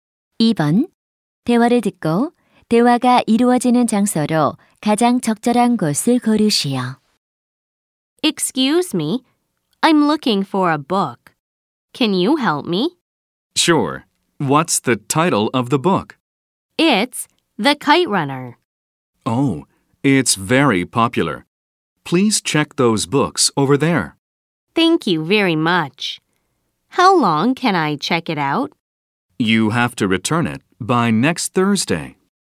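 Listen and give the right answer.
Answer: 도서관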